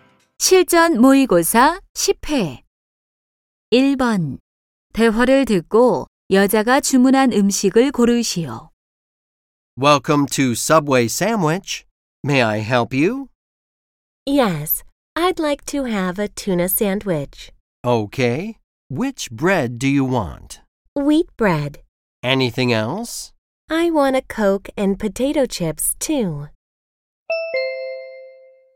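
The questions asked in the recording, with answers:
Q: 대화를 듣고 여자가 주문한 음식을 고르시오.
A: 참치 샌드위치(통밀빵), 콜라, 감자칩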